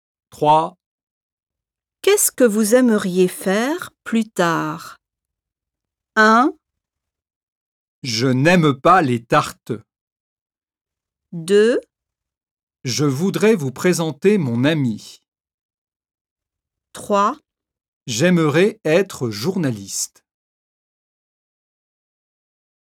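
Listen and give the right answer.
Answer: 3: J'aimerais être journaliste.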